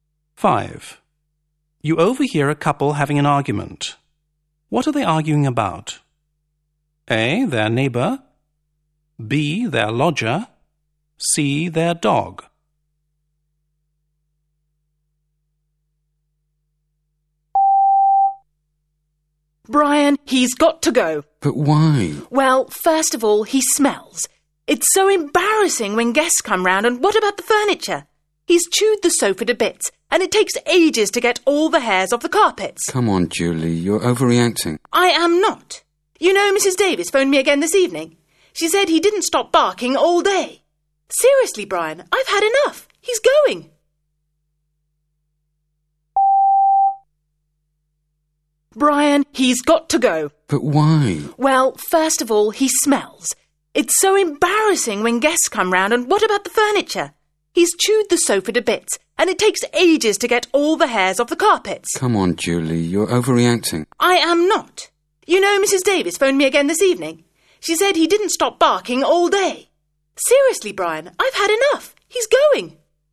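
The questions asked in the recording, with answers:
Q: What are they arguing about?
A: C: Their dog.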